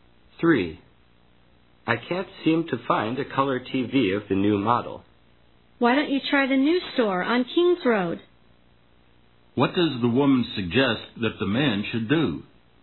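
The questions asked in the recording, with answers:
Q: What does the woman suggest that the man should do?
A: Try the new store on King's Road.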